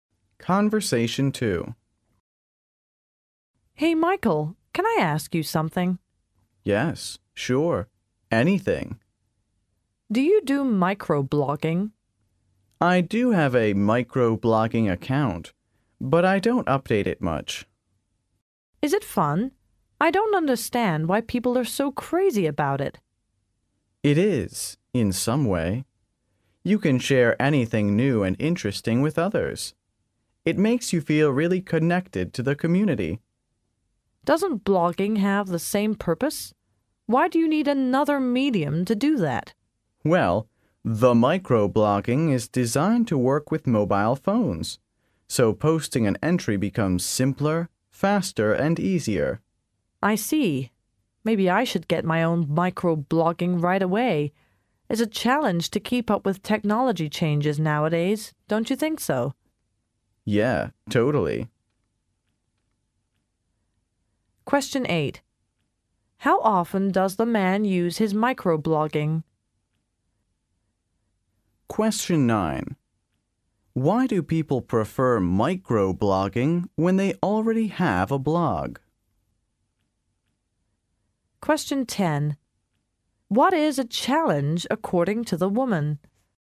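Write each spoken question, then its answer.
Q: How often does the man use his microblogging?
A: Not much; he rarely updates it

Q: Why do people prefer microblogging when they already have a blog?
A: It works with mobile phones, so posting is simpler, faster and easier

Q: What is a challenge according to the woman?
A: Keeping up with technology changes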